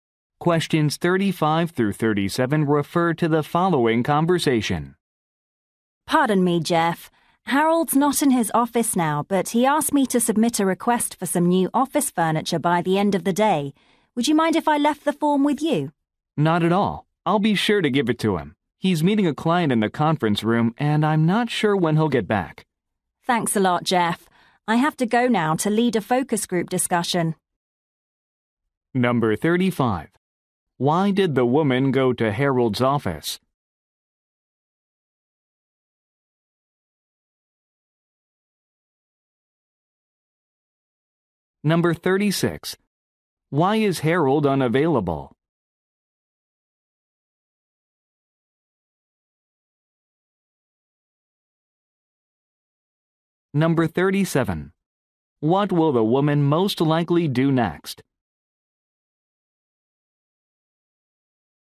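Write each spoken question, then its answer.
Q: Why did the woman go to Harold's office?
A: To submit a request for new office furniture

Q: Why is Harold unavailable?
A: He is meeting a client

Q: What will the woman most likely do next?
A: Lead a focus group discussion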